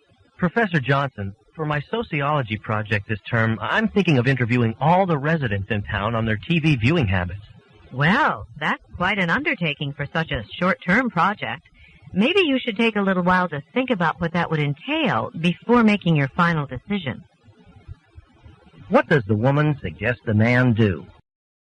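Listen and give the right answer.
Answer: Reconsider the project's scope before deciding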